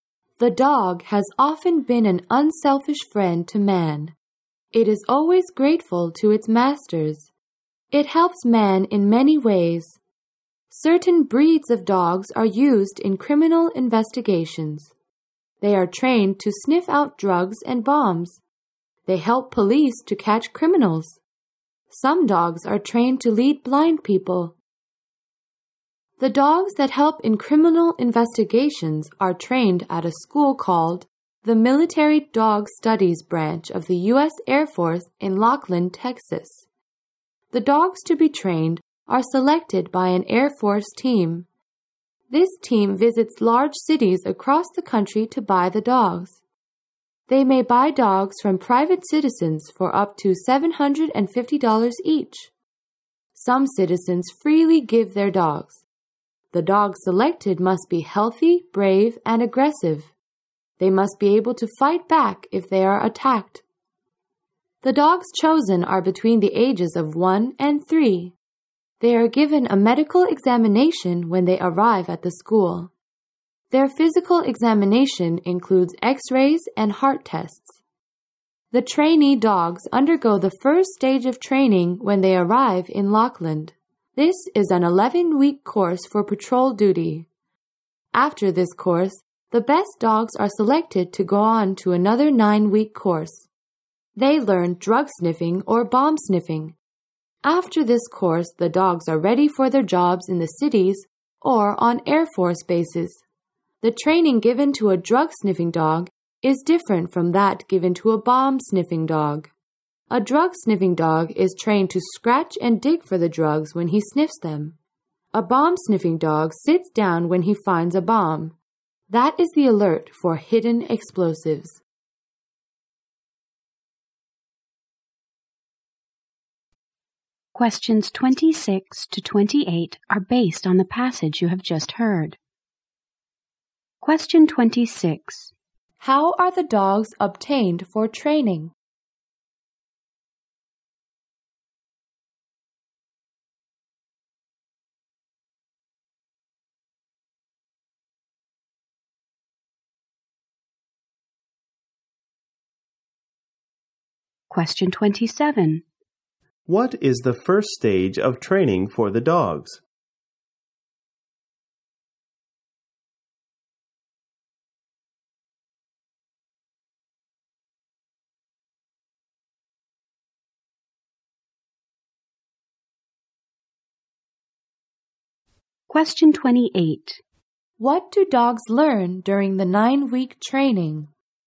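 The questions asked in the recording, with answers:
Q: How are the dogs obtained for training?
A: An Air Force team buys them from private citizens, or citizens give them

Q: What is the first stage of training for the dogs?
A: An 11-week course for patrol duty

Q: What do dogs learn during the 9-week training?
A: Drug sniffing or bomb sniffing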